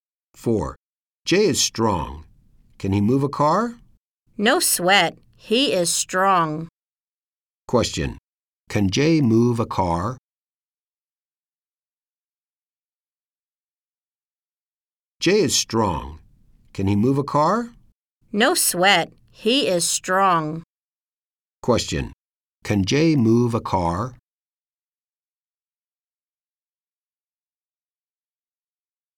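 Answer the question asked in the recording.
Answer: Yes, he can.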